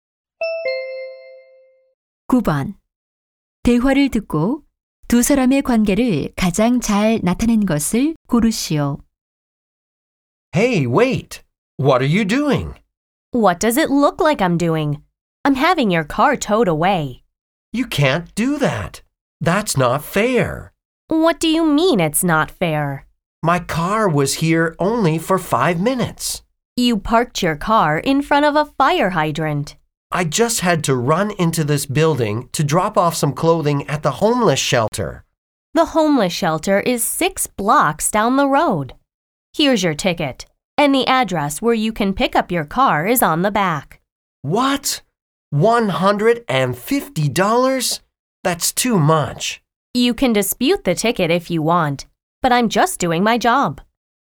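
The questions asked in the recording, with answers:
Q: 대화를 듣고 두 사람의 관계를 가장 잘 나타낸 것을 고르시오.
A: 견인 단속원 – 차 주인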